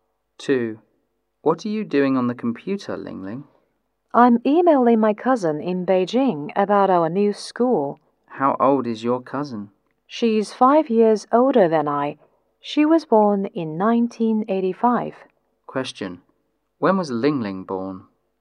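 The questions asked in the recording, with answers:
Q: When was Ling Ling born?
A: In 1990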